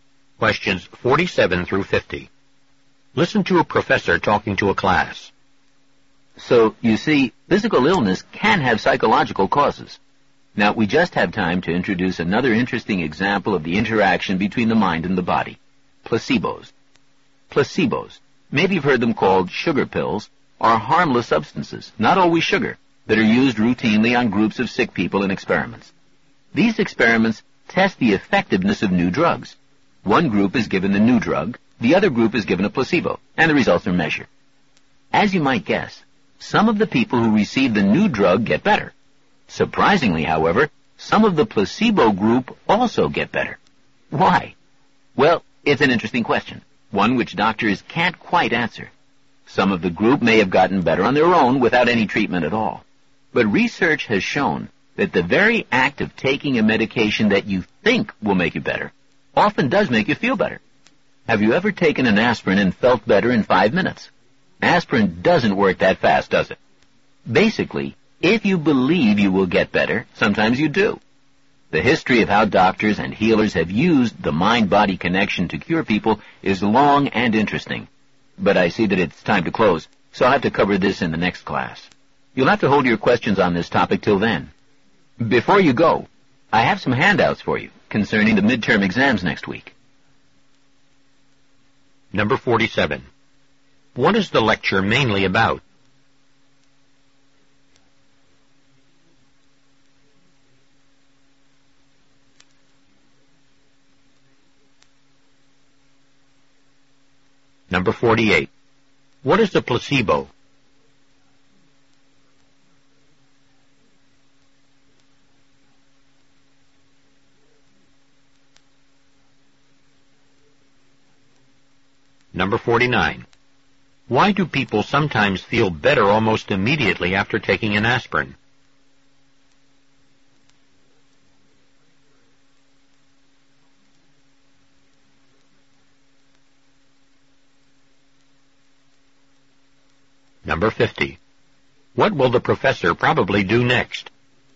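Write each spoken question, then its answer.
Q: What is the lecture mainly about?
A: Placebos and the mind-body interaction

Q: What is a placebo?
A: A harmless substance, like a sugar pill, given to a group of sick people in drug experiments

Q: Why do people sometimes feel better almost immediately after taking an aspirin?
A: Because they believe it will make them better

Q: What will the professor probably do next?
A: Give out handouts about next week's midterm exams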